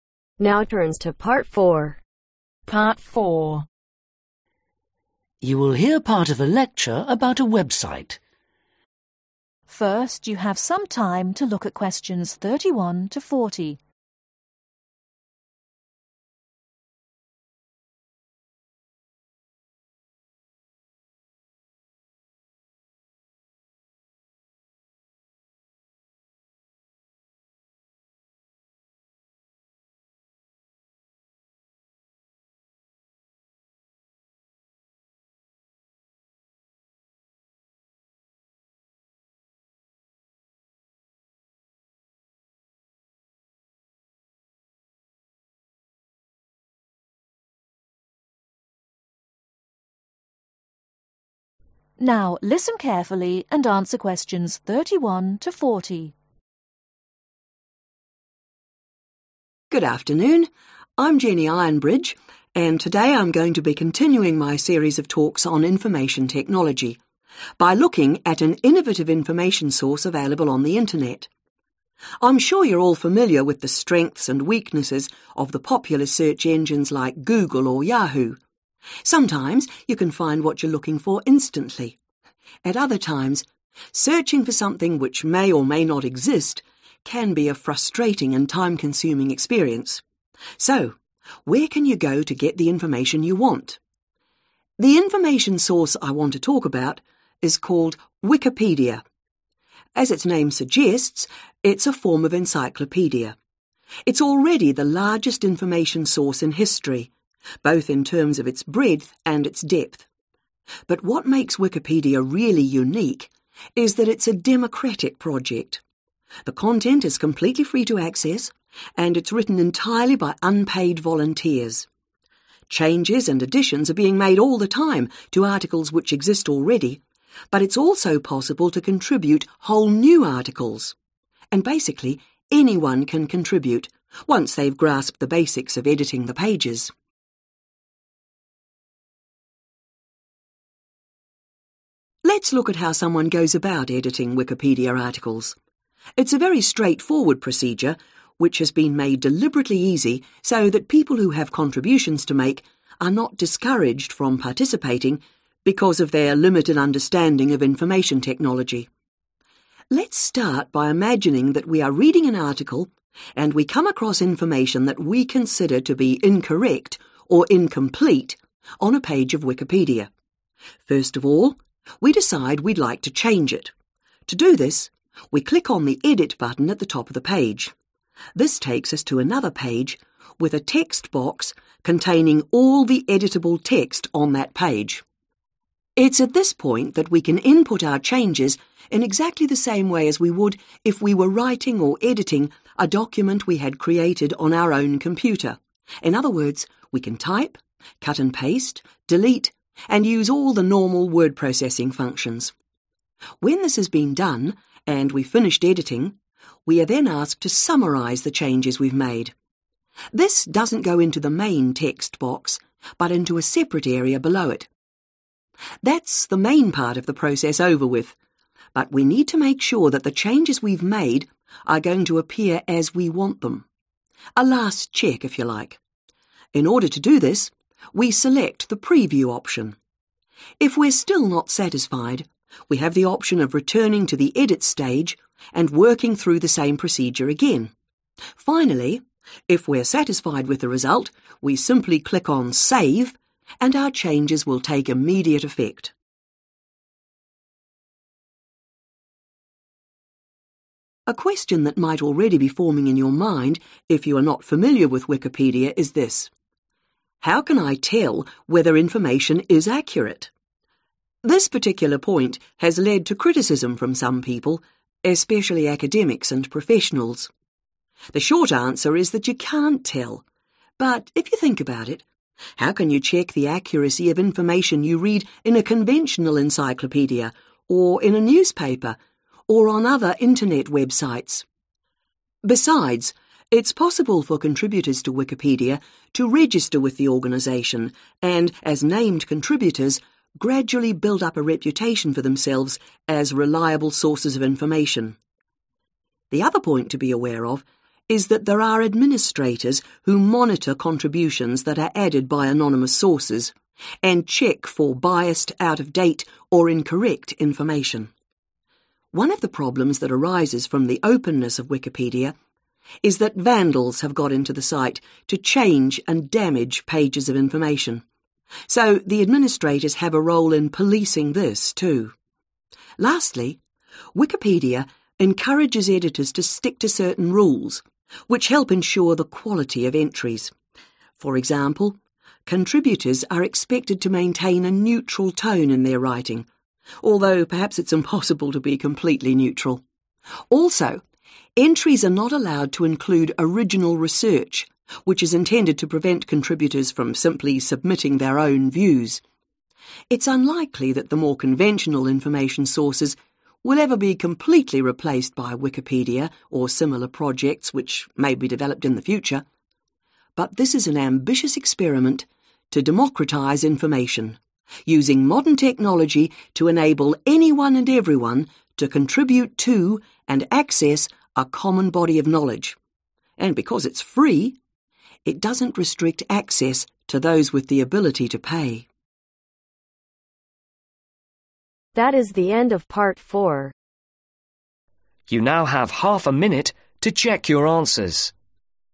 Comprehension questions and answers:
Write NO MORE THAN TWO WORDS for each answer.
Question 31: What information source is Wikipedia similar to ?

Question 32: Who are the authors of Wikipedia ?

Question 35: Select 35 ........... option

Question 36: Click on 36 ........... to finish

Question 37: Criticism of Wikipedia has focused on the question of 37 .................. .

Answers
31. an encyclopedia
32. unpaid volunteers
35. preview
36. save
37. accuracy